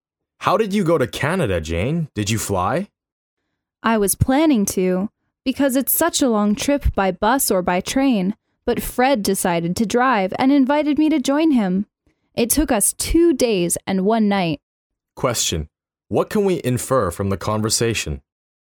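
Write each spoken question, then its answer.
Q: what can we infer from the conversation?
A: Jane went to Canada by car with Fred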